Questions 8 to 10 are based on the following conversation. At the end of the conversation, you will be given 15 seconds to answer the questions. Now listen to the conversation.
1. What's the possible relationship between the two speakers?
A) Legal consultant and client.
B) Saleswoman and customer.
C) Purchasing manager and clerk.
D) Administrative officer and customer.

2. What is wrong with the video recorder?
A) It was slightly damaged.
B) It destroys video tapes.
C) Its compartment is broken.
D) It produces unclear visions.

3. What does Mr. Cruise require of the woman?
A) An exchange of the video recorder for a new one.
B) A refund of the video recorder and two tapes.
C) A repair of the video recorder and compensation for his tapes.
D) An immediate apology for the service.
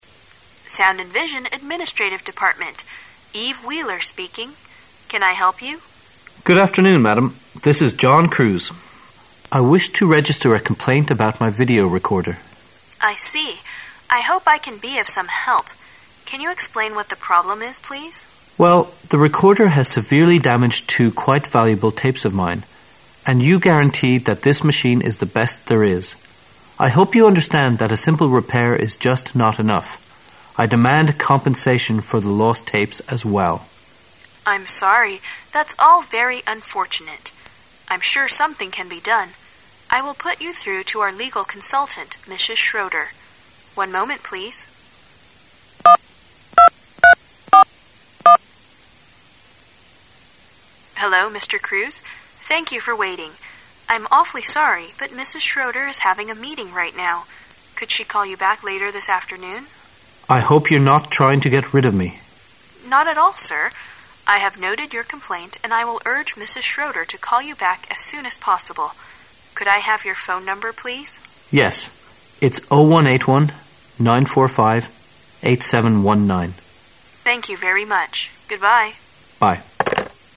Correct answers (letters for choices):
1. D
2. B
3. C

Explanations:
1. 本题测试推理能力,要求判断对话双方的关系。在理解全文大意的基础上,根据关键信息,如"Administrative Department","I wish to register a complaint about my video recorder"等可以推测两者之间的关系应为选项D:行政办公室职员与客户。 complaint n.投诉,抱怨 video recorder录像机
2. 本题测试对细节内容的理解和推测能力。根据原文的相关信息"the recorder has severely damaged two quite valuable tapes of mine",可以推测录像机的问题在于会损坏带子,因此正确答案为B。 guarantee v.担保,保证
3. 本题测试对细节内容的理解能力。根据原文中的相关信息"a simple repair is just not enough;I demand compensation for the lost tapes as well",可以直接找到正确答案C。 compensation n.补偿,赔偿 legal consultant法律顾问 urge v.催促,力劝

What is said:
[解析] 8-10 W: Sound and Vision, Administrative Department, Eve Wheeler speaking. Can 1 help you? M: Good afternoon, Madam. This is John Cruise. I wish to register a complaint about my video recorder. W: I see. I hope I can be of some help. Can you explain what the problem is, please? M: Well, the recorder has severely damaged two quite valuable tapes of mine. And you guaranteed that this machine is the best there is. I hope you understand that a simple repair is just not enough; I demand compensation for the lost tapes as well. W: I'm sorry; that's all very unfortunate. I'm sure something can be done. I will put you through to our legal consultant, Mrs. One moment please. ) W: Hello, Mr. Thank you for waiting. I'm awfully sorry, but Mrs. Schroder is having a meeting right now. Could she call you back later this afternoon? I hope you're not trying to get rid of me. W: Not at all, Sir. I have noted your complaint and I will urge Mrs. Schroder to call you back as soon as possible. Could I have your phone number, please? M: Yes. It's 0181 945 8719. Thank you very much. Goodbye. M: Bye.